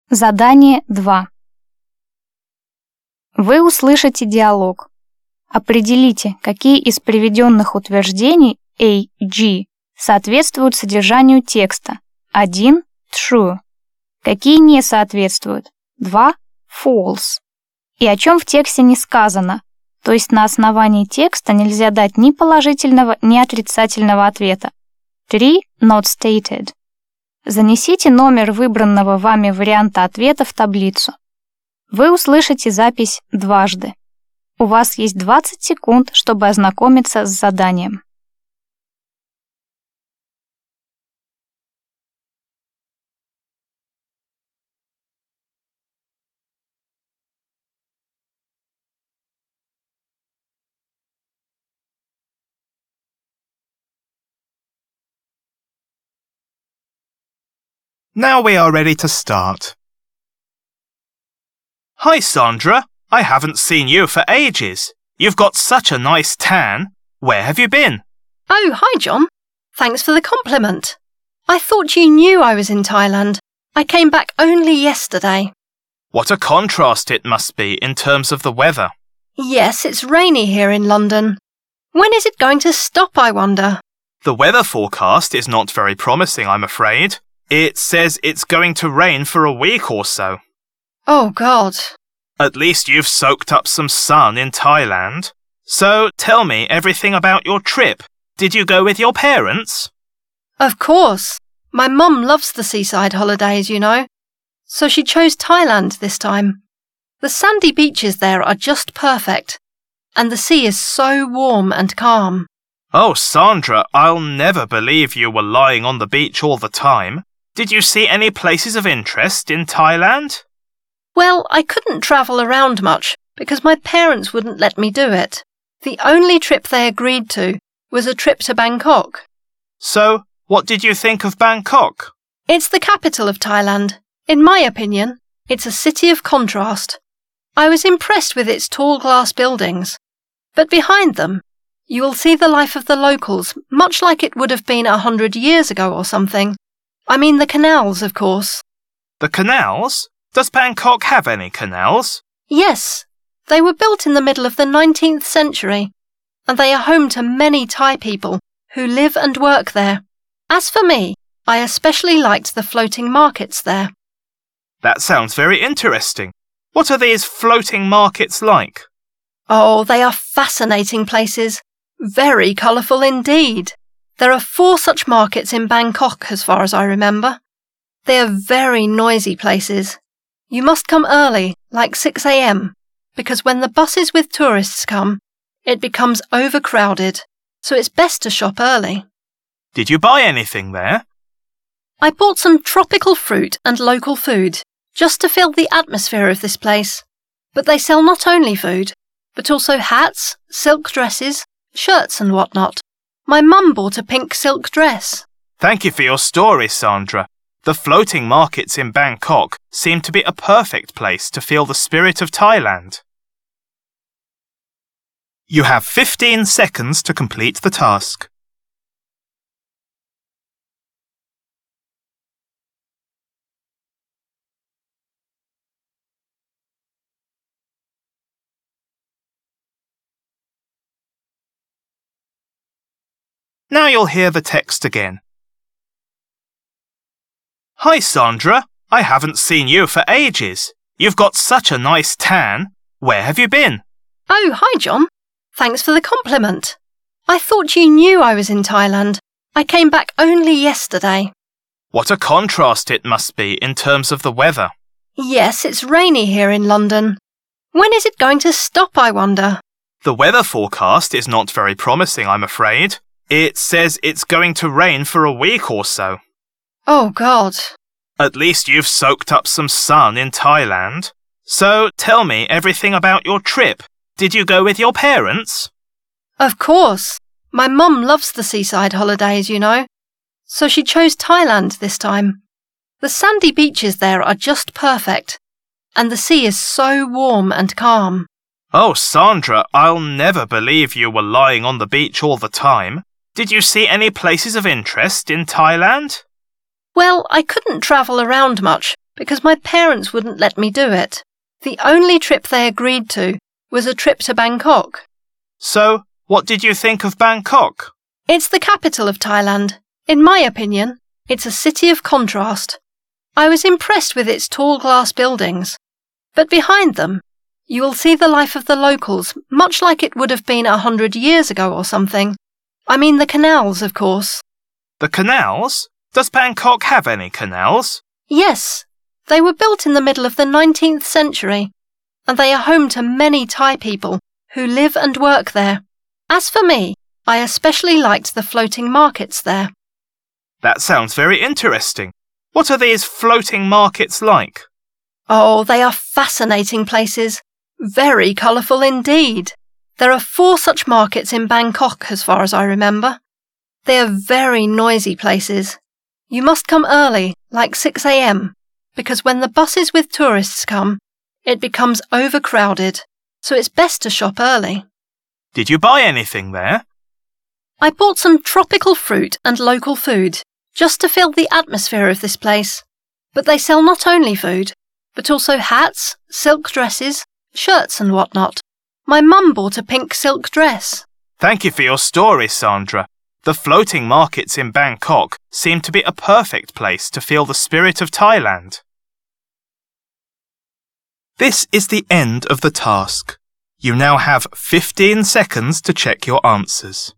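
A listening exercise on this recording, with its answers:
Вы услышите диалог. Определите, какие из приведённых утверждений А-G соответствуют содержанию текста (1 - True), какие не соответствуют (2 - False) и о чём в тексте не сказано, то есть на основании текста нельзя дать ни положительного, ни отрицательного ответа (3 - Not stated). Запишите ответ последовательностью из 7 цифр.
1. John and Sandra live in the UK.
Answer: True

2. John is pessimistic about the weather for the next week.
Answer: True

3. The best time to visit the floating markets is the midday.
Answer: False

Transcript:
John: Hi Sandra, I haven't seen you for ages. You've got such a nice tan. Where have you been?
Sandra: Oh, hi John. Thanks for the compliment. I thought you knew I was in Thailand. I came back only yesterday.
John: What a contrast it must be in terms of the weather.
Sandra: Yes, it's rainy here in London. 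When is it going to stop, I wonder?
John: The weather forecast is not very promising, I'm afraid. It says it's going to rain for a week or so.
Sandra: Oh God!
John: At least you've soaked up some sun in Thailand. So tell me everything about your trip. Did you go with your parents?
Sandra: Of course. My mum loves the seaside holidays, you know. So she chose Thailand this time. The sandy beaches there are just perfect, and the sea is so warm and calm.
John: Oh, Sandra, I'll never believe you were lying on the beach all the time. Did you see any places of interest in Thailand?
Sandra: Well, I couldn't travel around much because my parents wouldn't let me do it. The only trip they agreed to was a trip to Bangkok.
John: So what did you think of Bangkok?
Sandra: It's the capital of Thailand. In my opinion, it's a city of contrast. I was impressed with its tall glass buildings. But behind them, you will see the life of the locals, much like it would have been a hundred years ago or something. 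I mean the canals, of course.
John: The canals? Does Bangkok have any canals?
Sandra: Yes. They were built in the middle of the nineteenth century, and they are home to many Thai people who live and work there. As for me, I especially liked the floating markets there.
John: That sounds very interesting. What are these floating markets like?
Sandra: Oh, they are fascinating places. Very colourful indeed. There are four such markets in Bangkok, as far as I remember. They are very noisy places. You must come early, like 6am, because when the buses with tourists come, it becomes overcrowded, so it's best to shop early.
John: Did you buy anything there?
Sandra: I bought some tropical fruit and local food, just to feel the atmosphere of this place. But they sell not only food, but also hats, silk dresses, shirts and whatnot. My mum bought a pink silk dress.
John: Thank you for your story, Sandra.
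The floating markets in Bangkok seem to be a perfect place to feel the spirit of Thailand.»
Вы услышите диалог.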